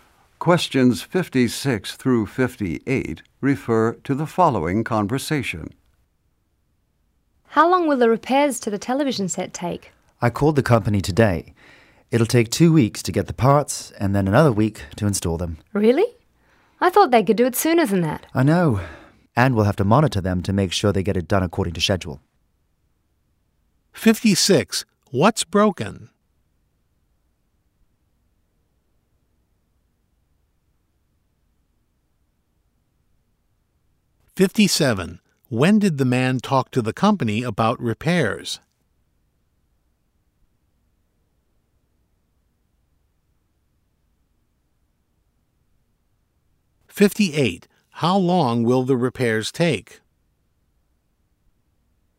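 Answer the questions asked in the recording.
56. The television set
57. Today
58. Three weeks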